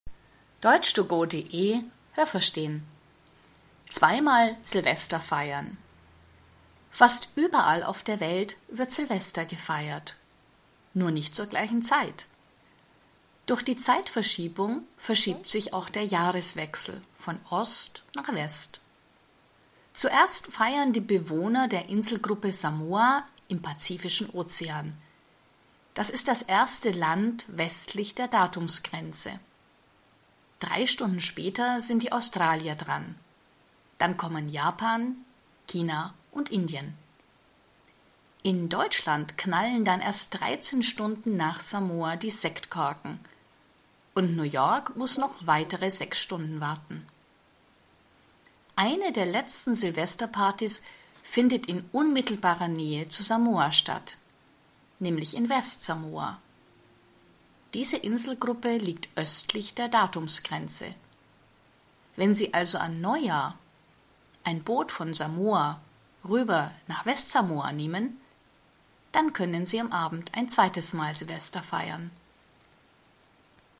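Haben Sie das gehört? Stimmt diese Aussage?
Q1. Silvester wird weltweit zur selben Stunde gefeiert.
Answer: Falsch

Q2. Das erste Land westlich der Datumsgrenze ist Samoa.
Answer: Richtig

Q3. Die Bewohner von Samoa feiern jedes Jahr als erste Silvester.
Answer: Richtig

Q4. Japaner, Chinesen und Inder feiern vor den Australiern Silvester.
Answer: Falsch

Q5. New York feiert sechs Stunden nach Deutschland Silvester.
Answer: Richtig

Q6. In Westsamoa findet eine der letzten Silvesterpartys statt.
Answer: Richtig

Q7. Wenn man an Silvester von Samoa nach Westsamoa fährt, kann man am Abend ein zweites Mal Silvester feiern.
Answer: Falsch

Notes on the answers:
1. Wegen der Zeitverschiebung verschiebt sich Silvester von Osten nach Westen.
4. Zuerst feiern die Australier, dann die Japaner, Chinesen und Inder.

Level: B (mittel)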